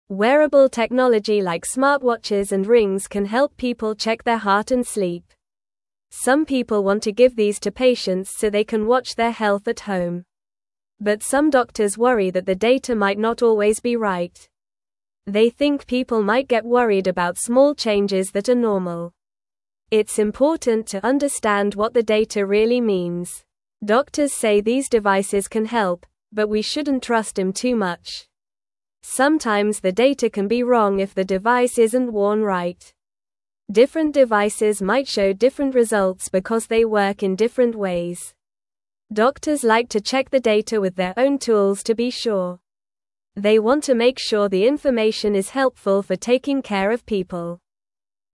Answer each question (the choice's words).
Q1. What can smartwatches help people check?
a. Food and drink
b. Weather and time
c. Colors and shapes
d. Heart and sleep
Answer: Heart and sleep

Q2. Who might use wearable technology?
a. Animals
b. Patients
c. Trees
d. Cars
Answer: Patients

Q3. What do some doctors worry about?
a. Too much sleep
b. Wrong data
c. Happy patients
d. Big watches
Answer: Wrong data

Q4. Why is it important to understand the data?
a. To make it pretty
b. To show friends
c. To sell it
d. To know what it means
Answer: To know what it means

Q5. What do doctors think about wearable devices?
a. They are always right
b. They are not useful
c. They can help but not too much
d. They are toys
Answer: They can help but not too much

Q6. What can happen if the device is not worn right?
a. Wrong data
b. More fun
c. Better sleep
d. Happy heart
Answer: Wrong data

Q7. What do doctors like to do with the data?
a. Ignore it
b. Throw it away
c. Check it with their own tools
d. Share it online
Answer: Check it with their own tools

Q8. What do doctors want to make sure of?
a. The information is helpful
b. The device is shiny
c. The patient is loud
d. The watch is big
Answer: The information is helpful

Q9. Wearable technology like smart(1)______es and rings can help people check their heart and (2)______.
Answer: watch

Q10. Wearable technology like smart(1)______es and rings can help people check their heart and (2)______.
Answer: sleep

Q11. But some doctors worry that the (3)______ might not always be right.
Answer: data

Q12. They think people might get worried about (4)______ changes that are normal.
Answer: small

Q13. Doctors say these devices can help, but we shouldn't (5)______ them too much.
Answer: trust

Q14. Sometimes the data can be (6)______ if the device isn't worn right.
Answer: wrong

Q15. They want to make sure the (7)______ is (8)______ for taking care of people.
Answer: information

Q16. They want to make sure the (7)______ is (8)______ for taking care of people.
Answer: helpful

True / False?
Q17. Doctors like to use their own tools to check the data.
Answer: True

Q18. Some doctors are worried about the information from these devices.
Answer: True

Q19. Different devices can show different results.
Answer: True

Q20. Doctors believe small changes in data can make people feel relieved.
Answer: False

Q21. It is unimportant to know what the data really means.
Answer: False

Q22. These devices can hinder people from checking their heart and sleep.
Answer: False

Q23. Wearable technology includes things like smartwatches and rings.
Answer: True

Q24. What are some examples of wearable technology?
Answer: Smartwatches and rings are examples of wearable technology.

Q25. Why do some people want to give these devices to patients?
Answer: They want to help patients check their health at home.

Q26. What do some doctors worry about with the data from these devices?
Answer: Doctors worry that the data might not always be right.

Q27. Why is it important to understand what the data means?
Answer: It is important so people do not get worried about normal changes.

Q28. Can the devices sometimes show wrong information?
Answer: Yes, the devices can sometimes show wrong information.

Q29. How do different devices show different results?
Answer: Different devices work in different ways, so they can show different results.

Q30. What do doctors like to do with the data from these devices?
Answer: Doctors like to check the data with their own tools to be sure.

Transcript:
Wearable technology like smartwatches and rings can help people check their heart and sleep. Some people want to give these to patients so they can watch their health at home. But some doctors worry that the data might not always be right. They think people might get worried about small changes that are normal. It's important to understand what the data really means.
Doctors say these devices can help, but we shouldn't trust them too much. Sometimes the data can be wrong if the device isn't worn right. Different devices might show different results because they work in different ways. Doctors like to check the data with their own tools to be sure. They want to make sure the information is helpful for taking care of people.

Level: Level 1